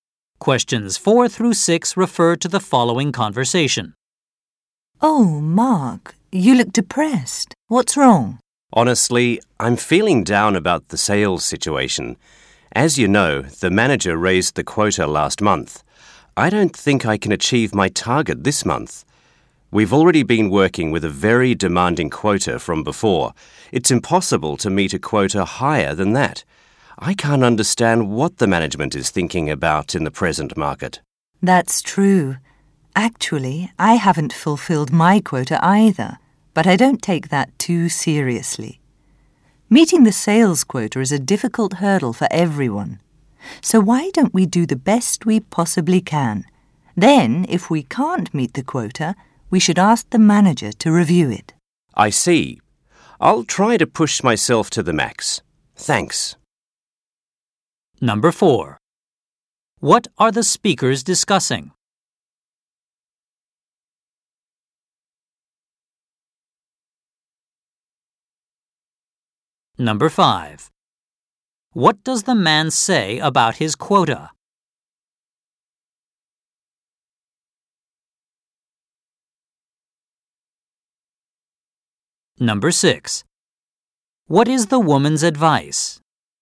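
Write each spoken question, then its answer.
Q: What are the speakers discussing?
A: Sales quotas

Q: What does the man say about his quota?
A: He doesn't think he can reach it this month because it was raised

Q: What is the woman's advice?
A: Do their best, and ask the manager to review the quota if they can't meet it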